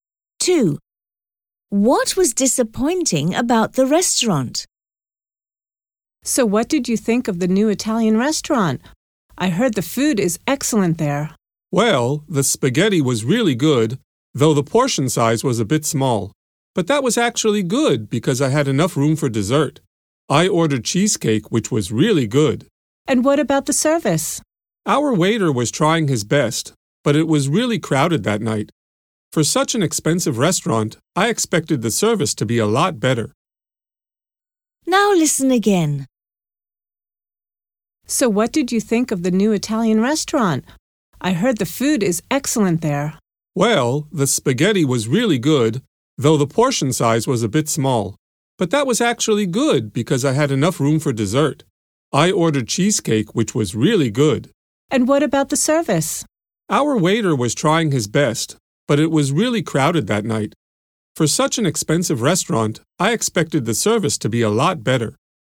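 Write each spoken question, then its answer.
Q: What was disappointing about the restaurant?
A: The service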